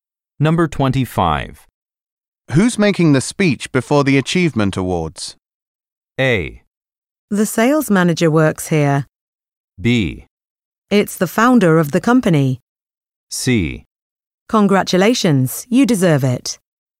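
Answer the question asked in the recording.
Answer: B: It's the founder of the company.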